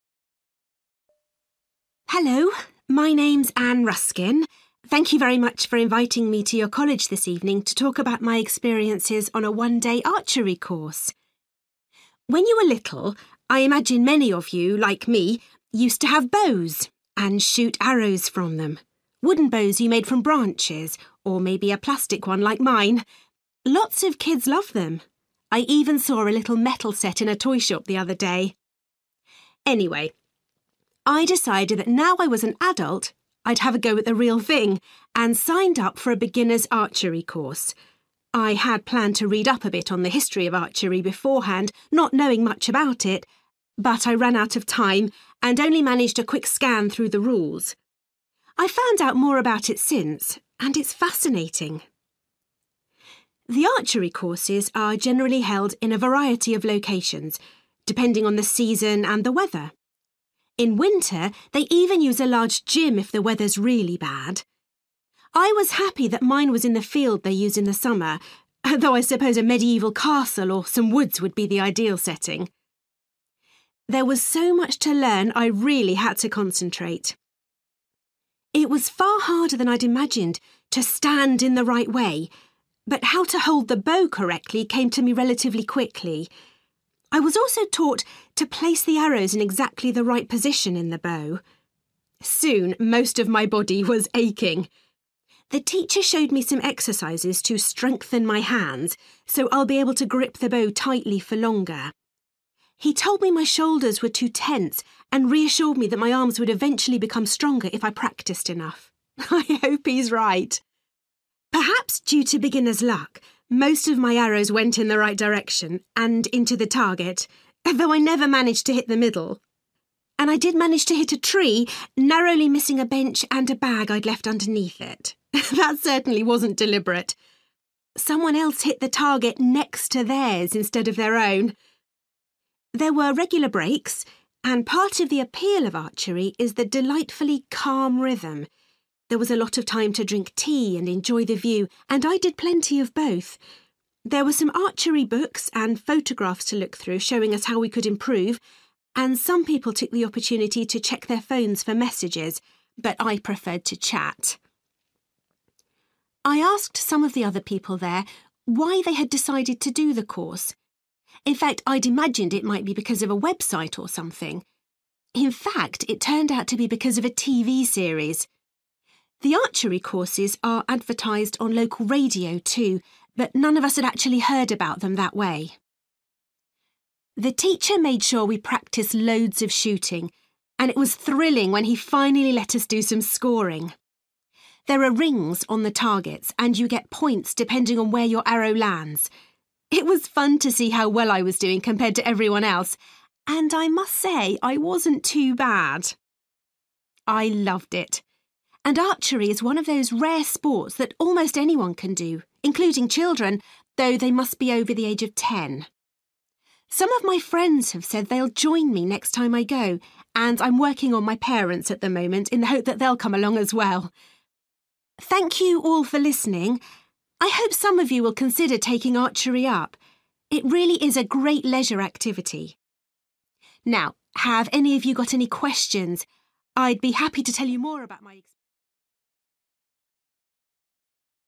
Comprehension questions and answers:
For questions 9-18, complete the sentences with a word or short phrase.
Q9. Anne used to shoot arrows from a bow made of (9) .......................................... when she was a child.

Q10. Anne only had time to read about the (10) .......................................... of archery before the beginner's archery course.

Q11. Anne's archery course took place in a (11) .......................................... .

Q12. Anne was surprised that learning to (12) .......................................... properly was so difficult.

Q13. The teacher told Anne she needed to relax her (13) .......................................... .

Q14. One of Anne's arrows went into a (14) .......................................... by accident.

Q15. During the breaks, Ann was happy to look at the (15) .......................................... and talk to other people.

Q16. Some of the people on Anne's course said that a (16) .......................................... had inspired them to try archery.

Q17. Anne was excited when the class were allowed to start (17) .......................................... .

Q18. Anne is trying to persuade her (18) .......................................... to do an archery course with her.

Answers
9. plastic
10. rules
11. field
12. stand
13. shoulders
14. tree
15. view
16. TV / television series
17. scoring / keeping (a) score
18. parents

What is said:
Hello, my name's Anne Ruskin. Thank you very much for inviting me to your college this evening to talk about my experiences on a one-day archery course.
When you were little, I imagine many of you, like me, used to have bows and shoot arrows from them – wooden bows you made from branches or maybe a plastic one like mine. Lots of kids love them – I even saw a little metal set in a toyshop the other day.
Anyway, I decided that now I was an adult I'd have a go at the real thing, and signed up for a beginners' archery course. I had planned to read up a bit on the history of archery beforehand, not knowing much about it. But I ran out of time and only managed a quick scan through the rules. I've found out more about it since, and it's fascinating.
The archery courses are generally held in a variety of locations, depending on the season and the weather. In winter, they even use a large gym if the weather's really bad. I was happy that mine was in the field they use in the summer, though I suppose a medieval castle or some woods would be the ideal setting.
There was so much to learn, I really had to concentrate. It was far harder than I'd imagined to stand in the right way, but how to hold the bow correctly came to me relatively quickly. I was also taught to place the arrows in exactly the right position in the bow.
Soon most of my body was aching! The teacher showed me some exercises to strengthen my hands, so I'll be able to grip the bow tightly for longer. He told me my shoulders were too tense and reassured me that my arms would eventually become stronger if I practised enough. I hope he's right!
Perhaps due to beginner's luck, most of my arrows went in the right direction, and into the target, though I never managed to hit the middle! And I did manage to hit a tree, narrowly missing a bench and a bag I'd left underneath it! That certainly wasn't deliberate! Someone else hit the target next to theirs instead of their own!
There were regular breaks, and part of the appeal of archery is the delightfully calm rhythm. There was a lot of time to drink tea, and enjoy the view, and I did plenty of both. There were some archery books and photographs to look through showing us how we could improve, and some people took the opportunity to check their phones for messages, but I preferred to chat.
I asked some of the other people there why they had decided to do the course. In fact, I'd imagined it might be because of a website or something. In fact, it turned out to be because of a TV series. The archery courses are advertised on local radio too, but none of us had actually heard about them that way.
The teacher made sure we practised loads of shooting and it was thrilling when he finally let us do some scoring. There are rings on the targets, and you get points depending on where your arrow lands. It was fun to see how well I was doing compared to everyone else! And I must say, I wasn't too bad!
I loved it, and archery is one of those rare sports that almost anyone can do, including children, though they must be over the age of ten. Some of my friends have said they'll join me next time I go, and I'm working on my parents at the moment, in the hope that they'll come along as well.
Thank you all for listening. I hope some of you will consider taking archery up. It really is a great leisure activity. Now, have any of you got any questions? I'd be happy to tell you more about ...

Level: B2